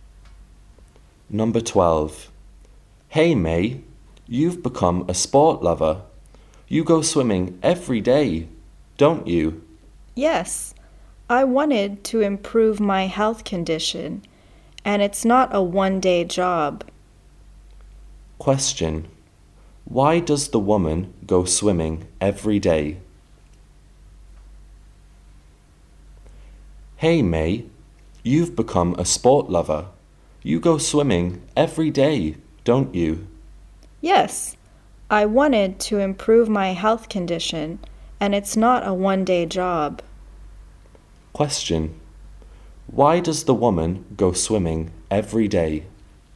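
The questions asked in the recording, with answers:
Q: Why does the woman go swimming every day?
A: To improve her health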